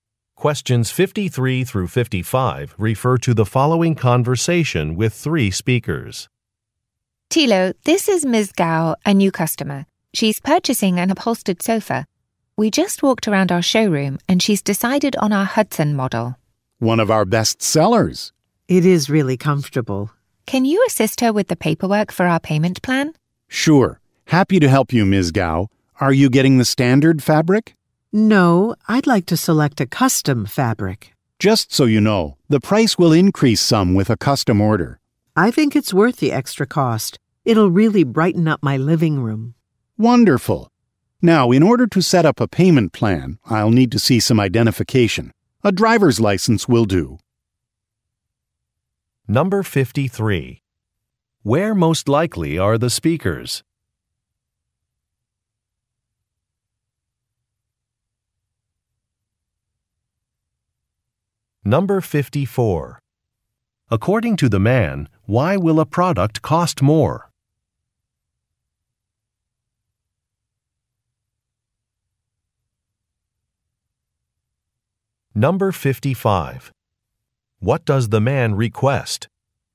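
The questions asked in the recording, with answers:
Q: Where most likely are the speakers?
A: In a furniture store

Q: According to the man, why will a product cost more?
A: It is a custom fabric order

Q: What does the man request?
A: Identification, such as a driver's license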